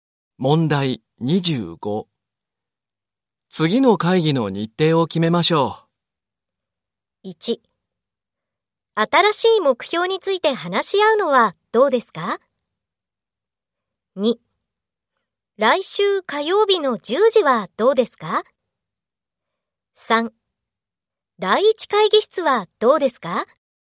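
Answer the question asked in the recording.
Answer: 2: 来週火曜日の10時はどうですか?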